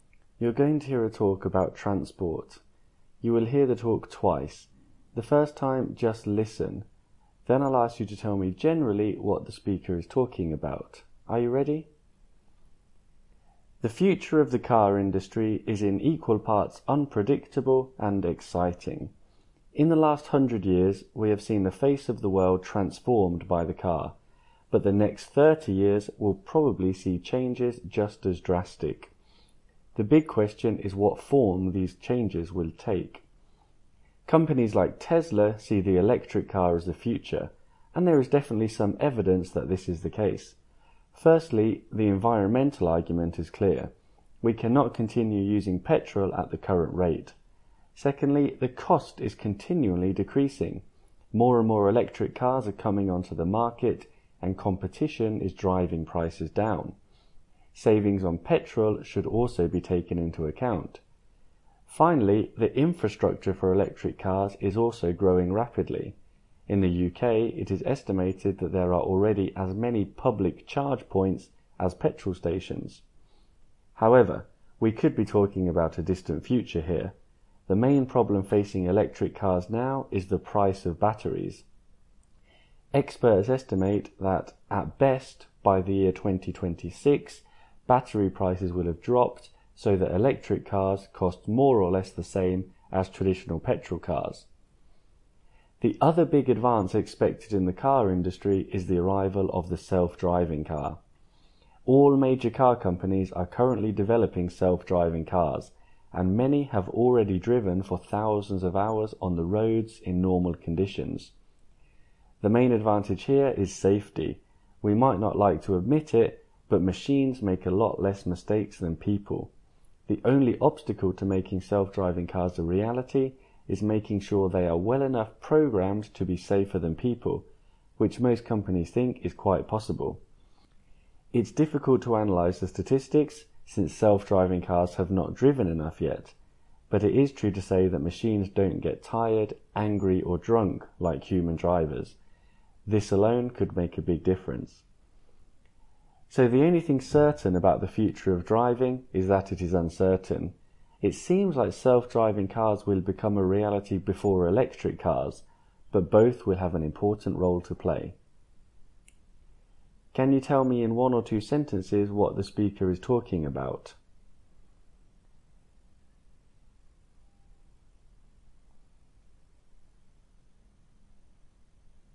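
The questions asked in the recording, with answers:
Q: Can you tell me in one or two sentences what the speaker is talking about?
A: The future of the car industry: electric cars and self-driving cars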